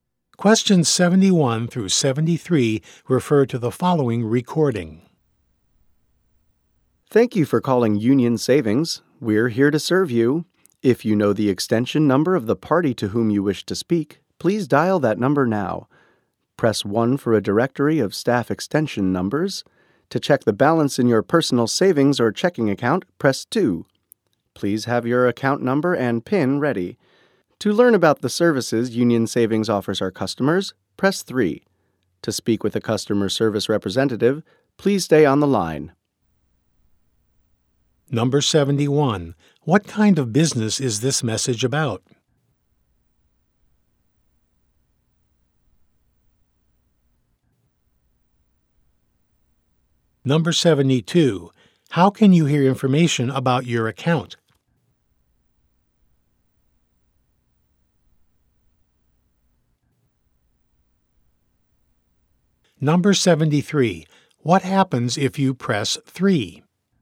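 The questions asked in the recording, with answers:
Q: What kind of business is this message about?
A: A bank (Union Savings)

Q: How can you hear information about your account?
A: Press 2

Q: What happens if you press 3?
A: You learn about the services Union Savings offers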